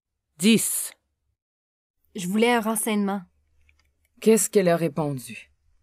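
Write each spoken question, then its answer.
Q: Qu'est-ce qu'elle a répondu?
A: Elle a répondu qu'elle voulait un renseignement.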